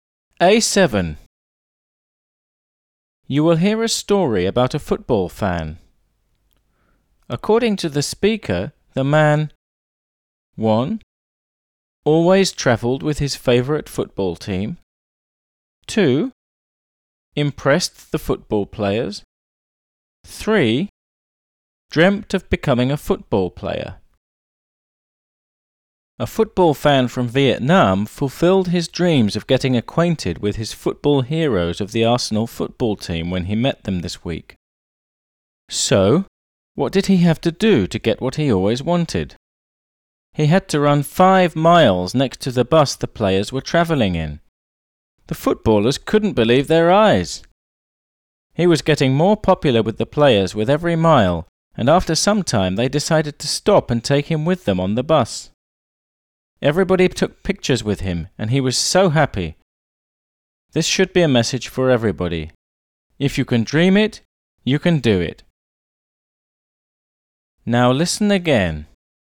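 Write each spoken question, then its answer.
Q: According to the speaker, the man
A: 2: Impressed the football players.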